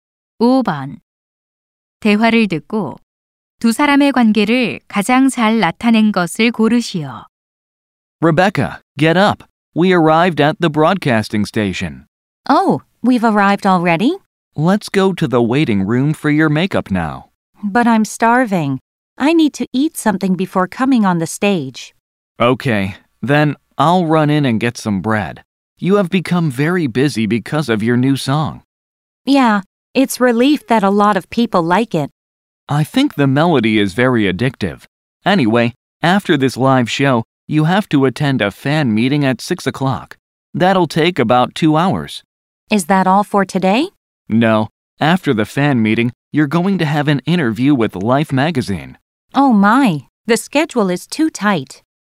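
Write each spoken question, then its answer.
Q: 대화를 듣고 두 사람의 관계를 가장 잘 나타낸 것을 고르시오.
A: 매니저 - 가수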